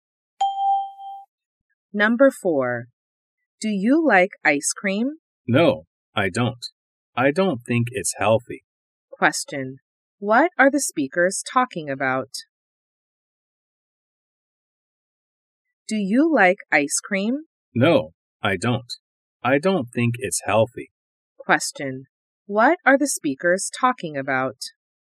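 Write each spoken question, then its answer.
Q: What are the speakers talking about?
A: Ice cream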